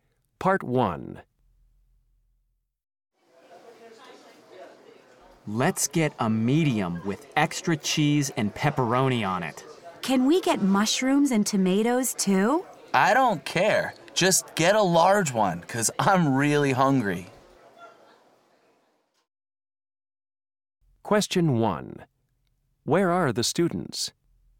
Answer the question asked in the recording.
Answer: This restaurant has got the best pizza on campus.